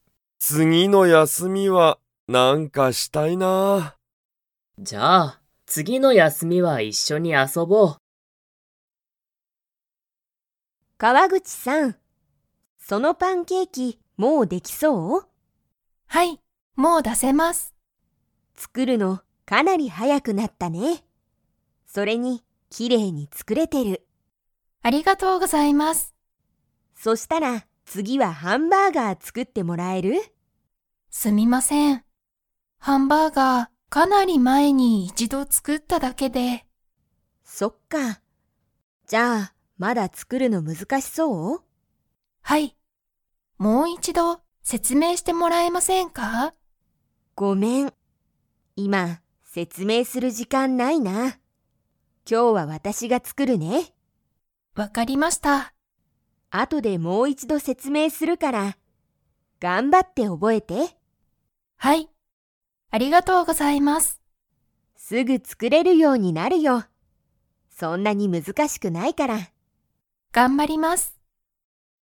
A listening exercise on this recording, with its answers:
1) 川口(かわぐち)さんは、パンケーキを作(つく)るのが____。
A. あまりきれいじゃない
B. かなり速(はや)くなった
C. 少(すこ)し難(むずか)しい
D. すぐにできない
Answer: かなり速(はや)くなった

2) 川口(かわぐち)さんは今日(きょう)、ハンバーガーを作(つく)りますか?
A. はい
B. いいえ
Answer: いいえ

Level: Level 2

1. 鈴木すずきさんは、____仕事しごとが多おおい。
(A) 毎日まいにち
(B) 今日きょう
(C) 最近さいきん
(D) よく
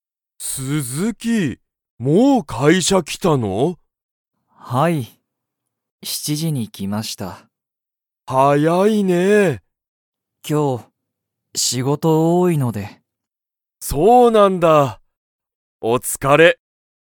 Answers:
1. 今日きょう

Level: Level 1

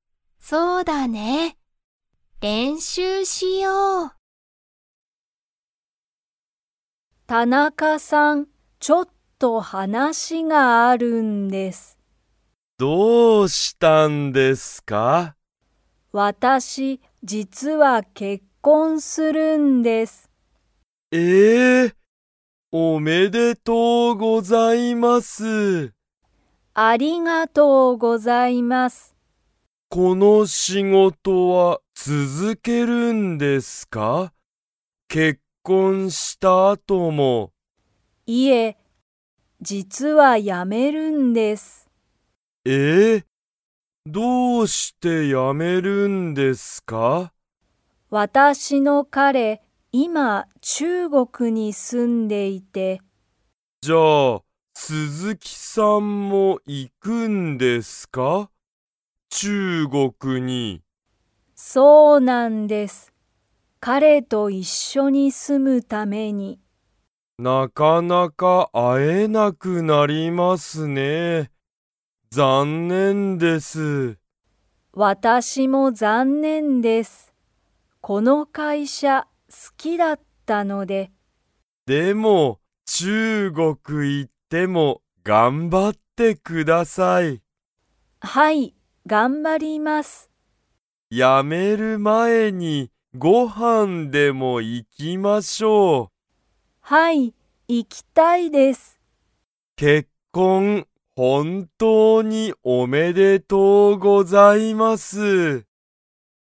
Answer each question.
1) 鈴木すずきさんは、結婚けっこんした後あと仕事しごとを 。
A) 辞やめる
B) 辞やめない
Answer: 辞やめる

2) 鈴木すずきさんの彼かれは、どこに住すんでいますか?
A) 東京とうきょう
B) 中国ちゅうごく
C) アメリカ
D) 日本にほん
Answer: 中国ちゅうごく

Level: Level 3

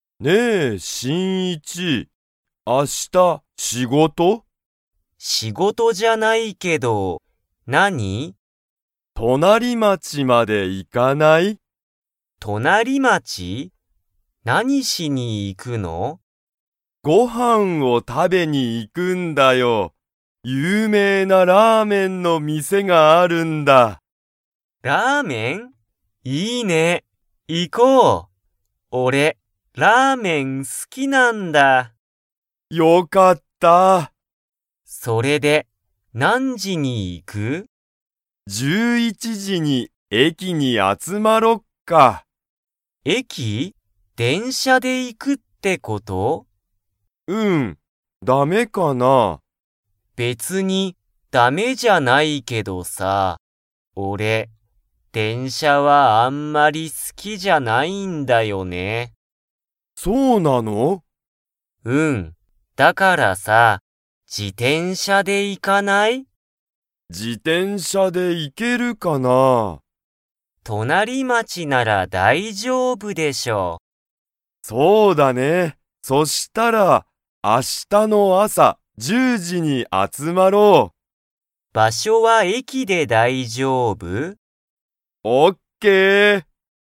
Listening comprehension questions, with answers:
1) シンイチは、明日あした仕事しごとが 。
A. ある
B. ない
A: ない

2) 二人ふたりは、何時なんじに集あつまりますか?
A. 9時じ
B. 10時じ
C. 11時じ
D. 12時じ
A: 10時じ

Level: Level 3

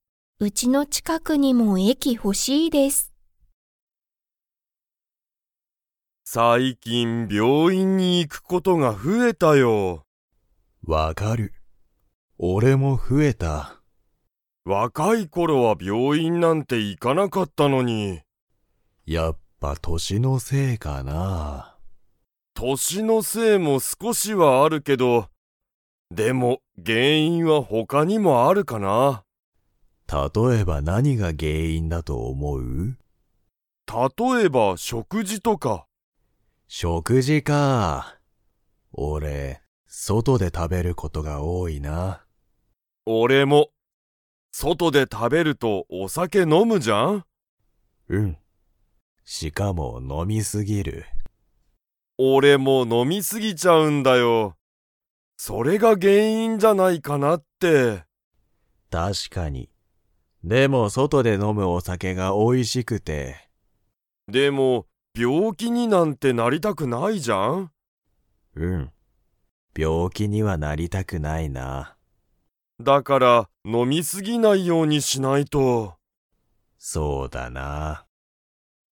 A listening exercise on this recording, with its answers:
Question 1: 二人ふたりは、最近さいきん病院びょういんに行いくことが増ふえましたか?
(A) はい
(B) いいえ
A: はい

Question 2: 二人ふたりは、外そとで食たべると を飲のむ。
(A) 病院びょういん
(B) お酒さけ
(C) 病気びょうき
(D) 駅えき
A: お酒さけ

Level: Level 3

